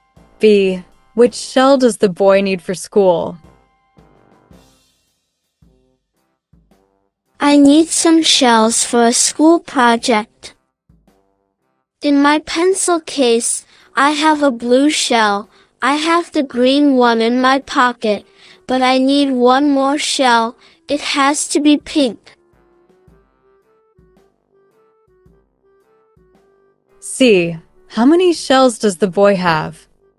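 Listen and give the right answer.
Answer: a pink shell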